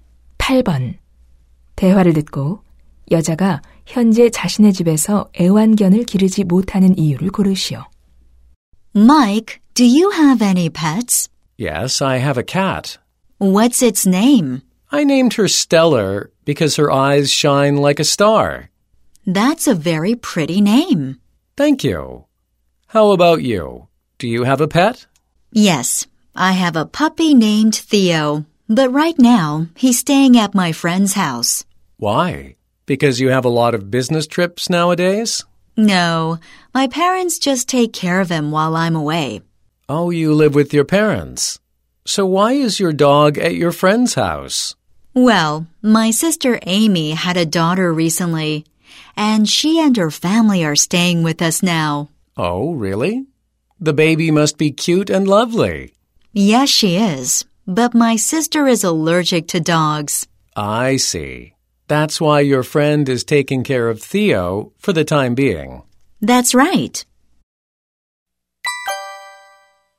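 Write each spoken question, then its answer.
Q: 대화를 듣고 여자가 현재 자신의 집에서 애완견을 기르지 못하는 이유를 고르시오.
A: 함께 지내는 언니(여동생)가 개 알레르기가 있어서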